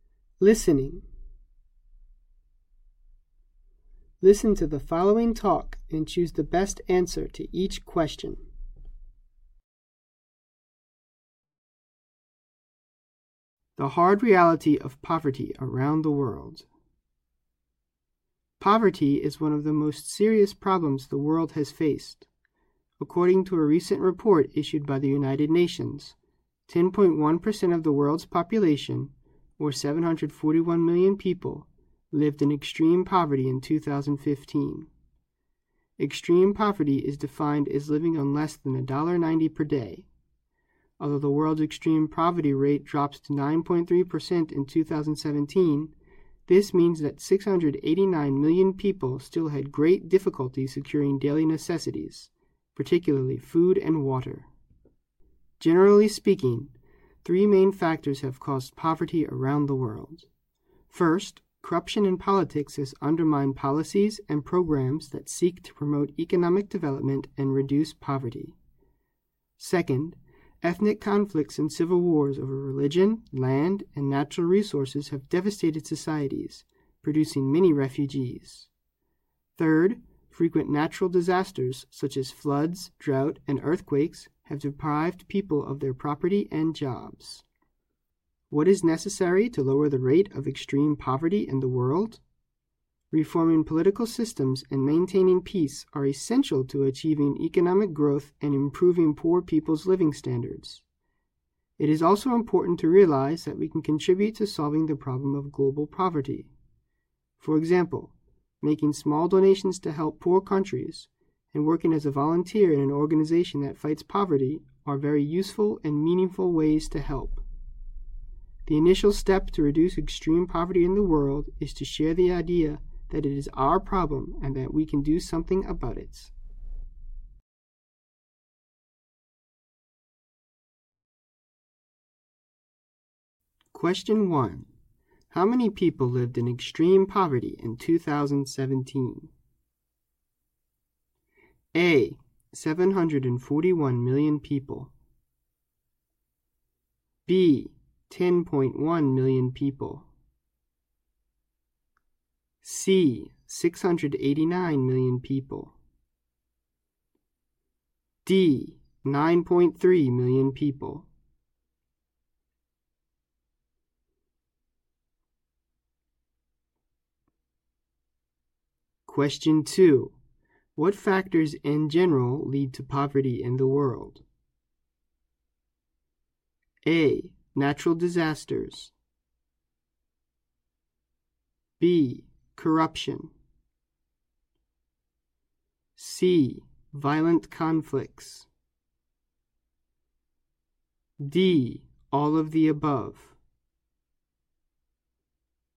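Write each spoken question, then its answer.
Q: How many people lived in extreme poverty in 2017?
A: C: 689 million people.

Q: What factors in general lead to poverty in the world?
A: D: All of the above.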